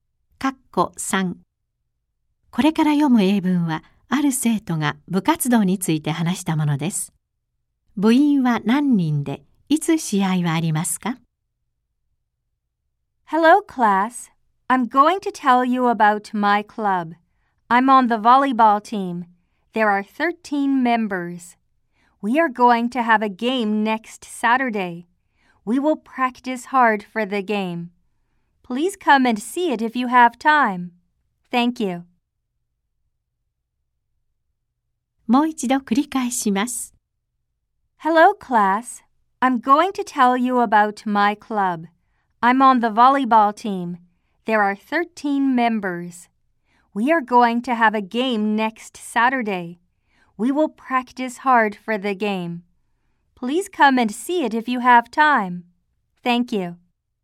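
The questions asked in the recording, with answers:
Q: 部員は何人で、いつ試合はありますか?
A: 13人で、次の土曜日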